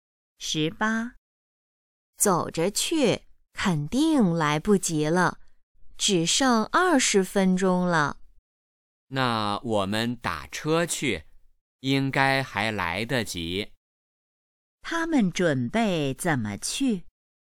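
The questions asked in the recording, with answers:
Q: 他们准备怎么去?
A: 打车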